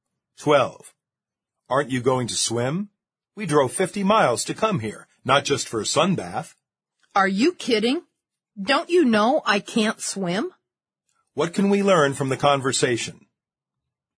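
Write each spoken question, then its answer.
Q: What can we learn from the conversation?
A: The second speaker can't swim.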